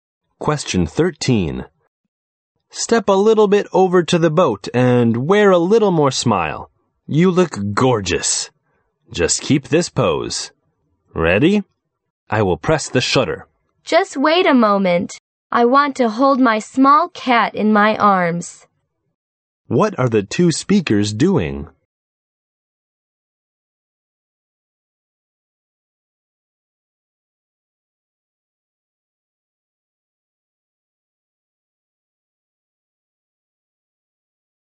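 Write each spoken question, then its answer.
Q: What are the 2 speakers doing?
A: Taking a photo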